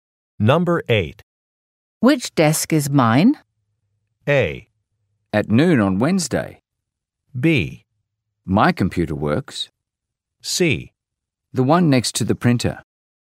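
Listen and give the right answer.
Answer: C: The one next to the printer.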